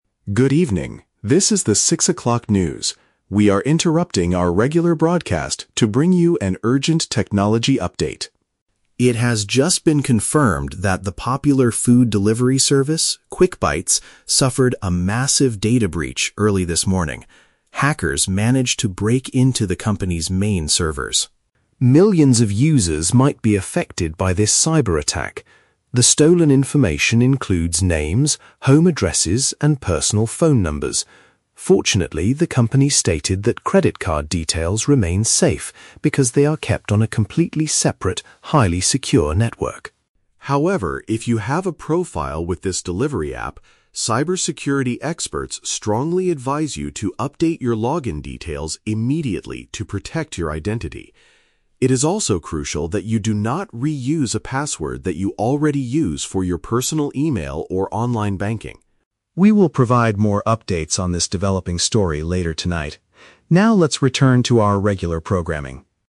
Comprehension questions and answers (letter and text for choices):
Listen to the news broadcast and choose the correct answer (A, B, or C) for each question.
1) What kind of data was successfully stolen by the hackers?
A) Customers' financial and payment records.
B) People's personal contact and location information.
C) The private messages between drivers and customers.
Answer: B) People's personal contact and location information.

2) What action should current users of the delivery service take?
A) Remove the application from their smartphones completely.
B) Contact their bank to pause all online transactions.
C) Change the security phrase they use to access their account.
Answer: C) Change the security phrase they use to access their account.

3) What specific warning does the news anchor give about making a new password?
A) People should not use the same code they use for other important websites.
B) People should avoid using their home address as their new secret code.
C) People must make sure the new password is updated early tomorrow morning.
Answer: A) People should not use the same code they use for other important websites.

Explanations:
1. The news anchor states that the stolen information includes "names, home addresses, and personal phone numbers." Option B paraphrases this as "contact and location information." Why the traps are wrong: Option A is a trap because the audio specifically mentions that "credit card details remain safe." Option C is a plausible feature of a delivery app, but it is never mentioned in the broadcast.
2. The anchor advises users to "update your login details immediately." Option C uses the synonym phrase "Change the security phrase they use to access their account." Why the traps are wrong: Option A is a logical reaction, but deleting the app is never suggested by the speaker. Option B is a trap; the word "bank" is mentioned later in the script, but users are not told to contact their bank since their financial data is safe.
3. The anchor explicitly warns, "do not reuse a password that you already use for your personal email or online banking." Option A paraphrases this advice perfectly. Why the traps are wrong: Option B is a trap because "home addresses" were mentioned earlier as stolen data, but not as a bad password choice. Option C is a trap because "early this morning" was when the hack happened, not the deadline to change the password (which should be done "immediately").

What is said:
News Anchor: Good evening, this is the six o'clock news. We are interrupting our regular broadcast to bring you an urgent technology update.
It has just been confirmed that the popular food delivery service, QuickBites, suffered a massive data breach early this morning. Hackers managed to break into the company's main servers.
Millions of users might be affected by this cyber attack. The stolen information includes names, home addresses, and personal phone numbers. Fortunately, the company stated that credit card details remain safe because they are kept on a completely separate, highly secure network.
However, if you have a profile with this delivery app, cybersecurity experts strongly advise you to update your login details immediately to protect your identity. It is also crucial that you do not reuse a password that you already use for your personal email or online banking.
We will provide more updates on this developing story later tonight. Now, let's return to our regular programming.